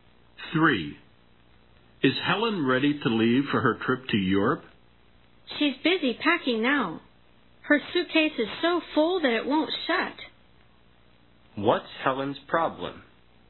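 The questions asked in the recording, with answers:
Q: What's Helen's problem?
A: Her suitcase is too full to shut.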